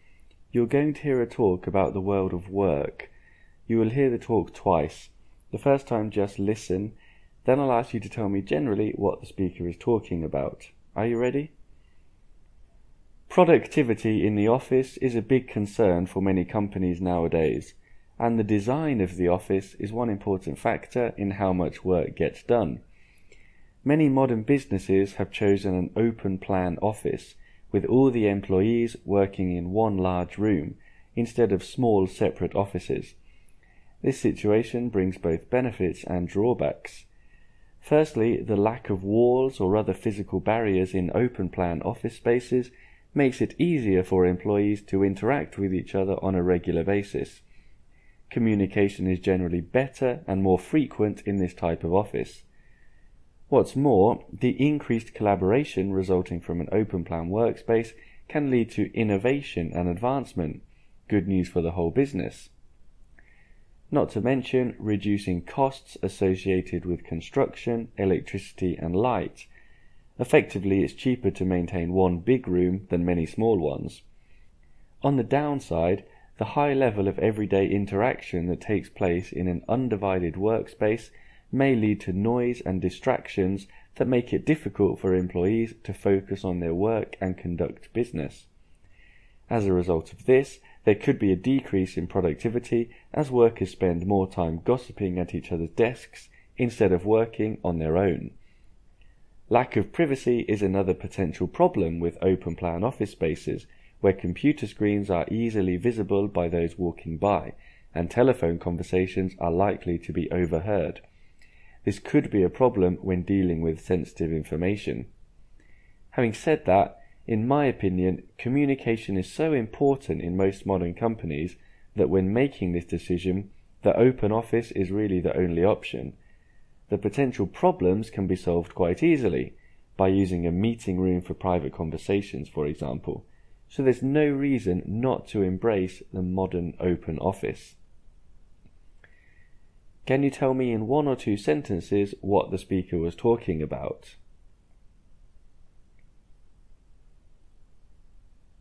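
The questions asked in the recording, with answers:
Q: Can you tell me in one or two sentences what the speaker was talking about?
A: The benefits and drawbacks of open-plan offices; the speaker thinks companies should choose them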